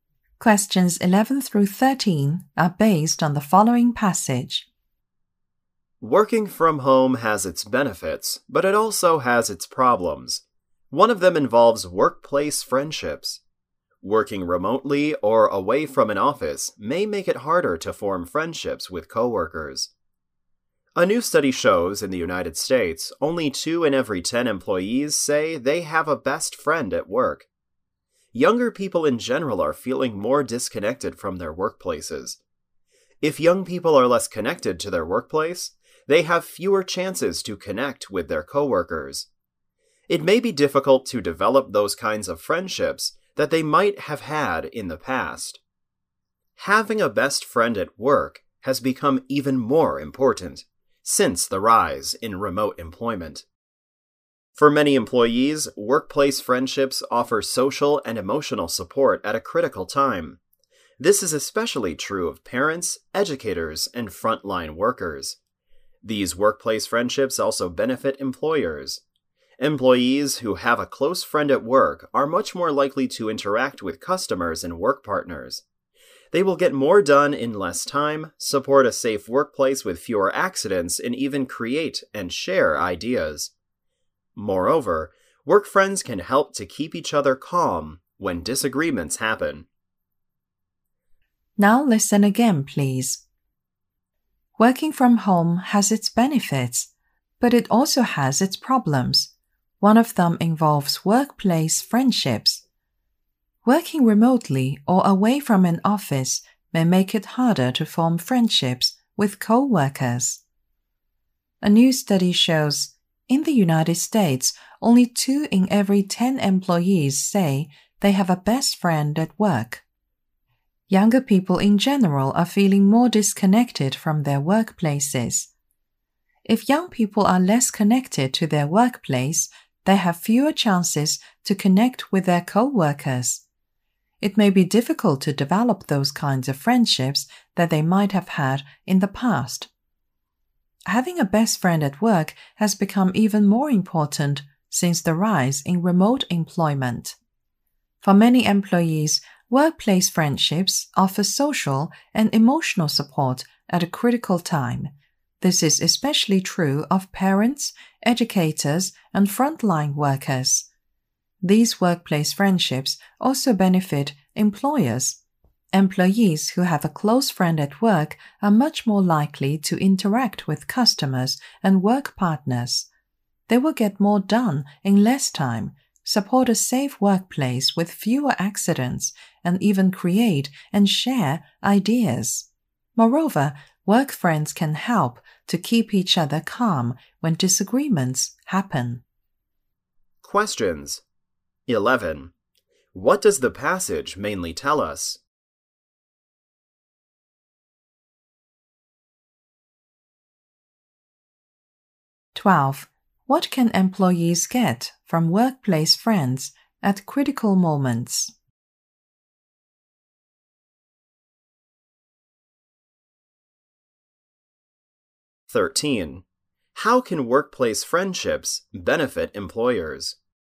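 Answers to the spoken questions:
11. Why workplace friendships matter and are harder to form when working remotely
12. Social and emotional support
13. Employees get more done in less time, have fewer accidents and share ideas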